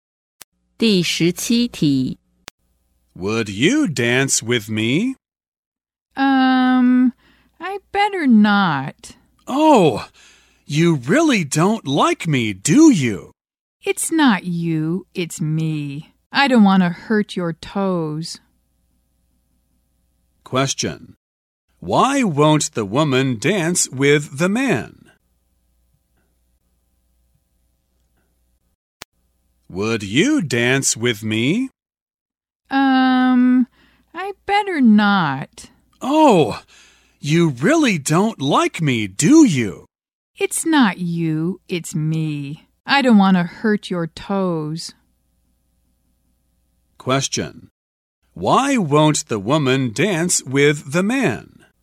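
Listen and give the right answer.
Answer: She's a bad dancer and doesn't want to step on his toes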